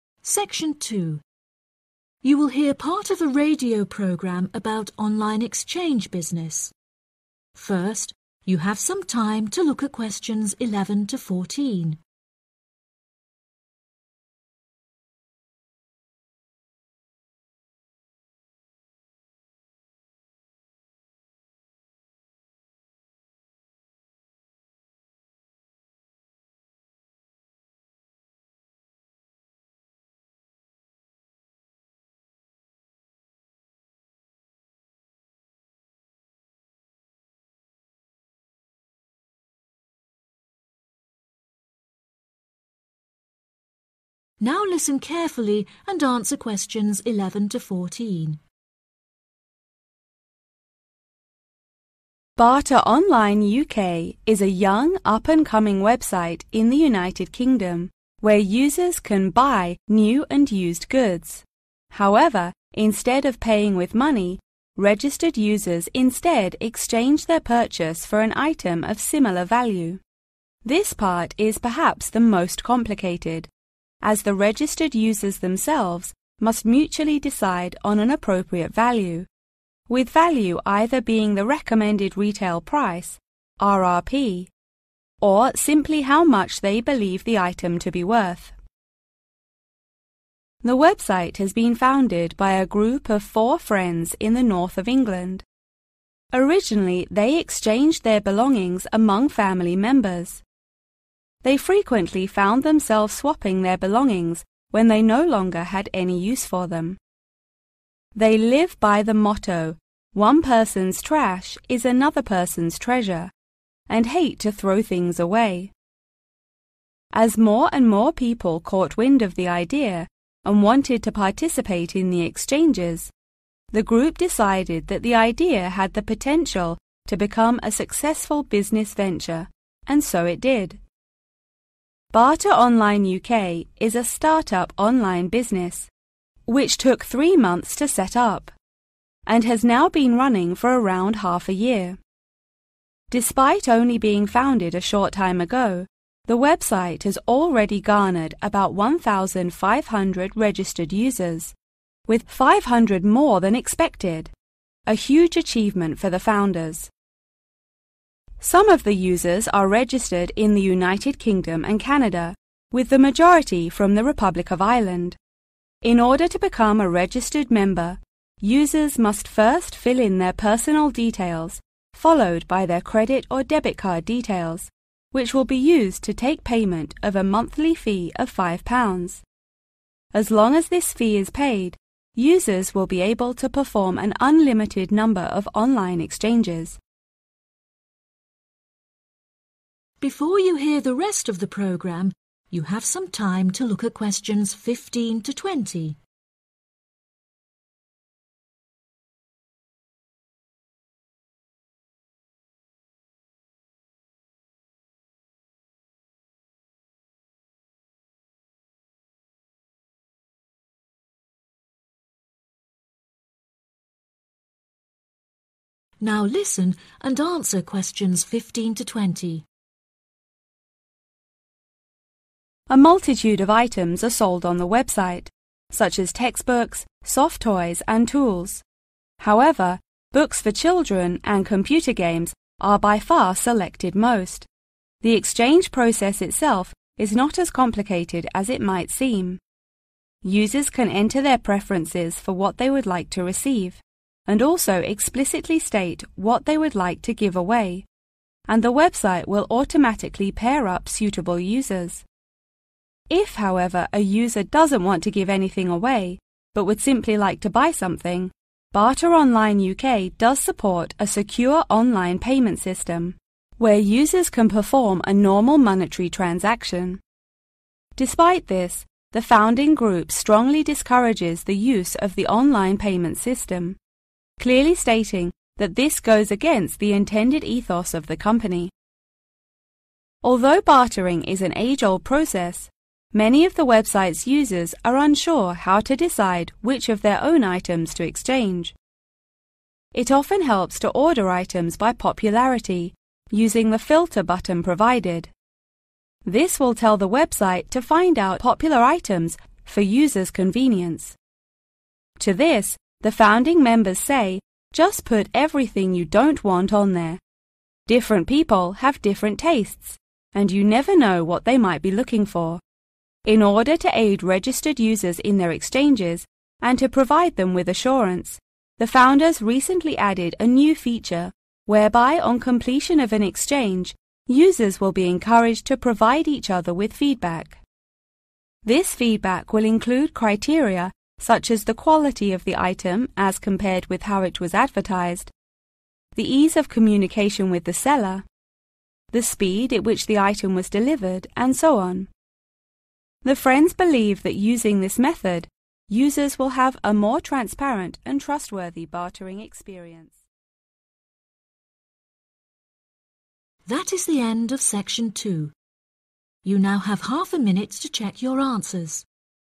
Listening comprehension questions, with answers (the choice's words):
Choose the correct letter, A, B or C.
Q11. The website is organised by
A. family members.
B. friends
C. businessmen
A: friends

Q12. How long has the website been operated?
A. about 3 weeks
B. about 3 months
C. about 6 months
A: about 6 months

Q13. How many registered users are there in the website?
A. 1,000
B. 1,500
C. 2,000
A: 1,500

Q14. Which country has the most users in the website?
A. Ireland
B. UK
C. Canada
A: Ireland

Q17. The website will sort out 17............... items to help those who can't decide what to exchange.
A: popular

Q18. Do not bother because people's 18............... are different.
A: tastes

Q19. Users will give 19............... on the completion of exchanges.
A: feedback

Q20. the 20............... of delivering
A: speed